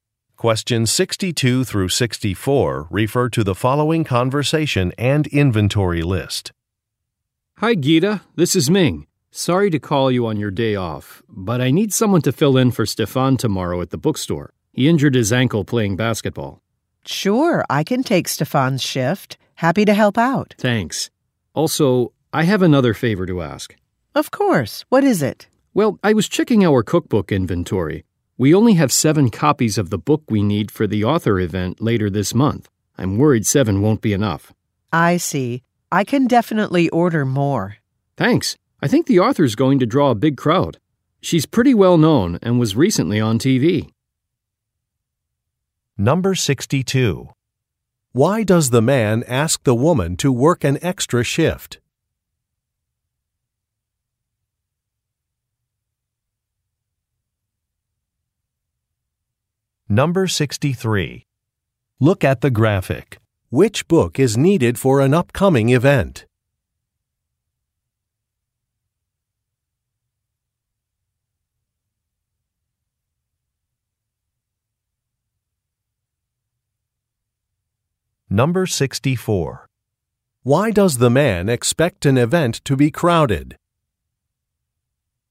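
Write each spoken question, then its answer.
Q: Why does the man ask the woman to work an extra shift?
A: Because a coworker (Stefan) injured his ankle.

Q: Why does the man expect an event to be crowded?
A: The author is well known and was recently on TV.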